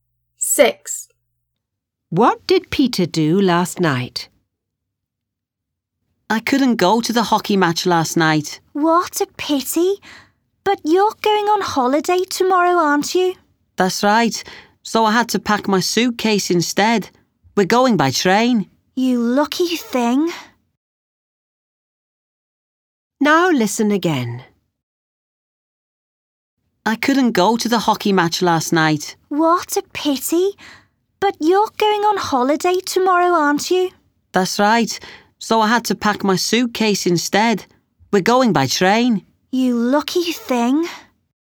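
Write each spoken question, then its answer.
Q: What did Peter do last night?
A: He packed his suitcase.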